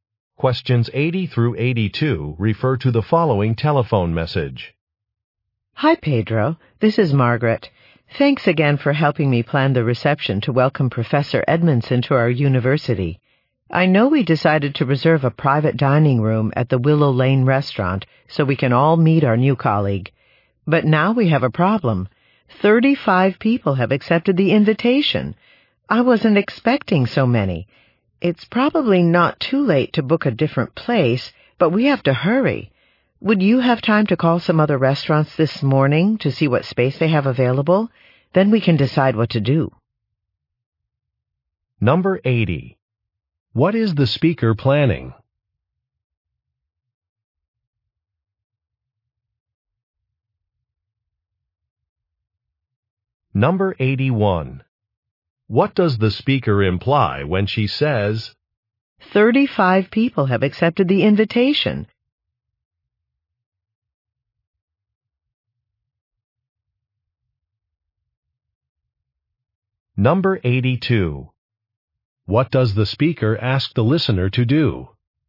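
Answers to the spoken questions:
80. A welcome reception for a new professor
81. The reserved room is too small
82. Call other restaurants to check available space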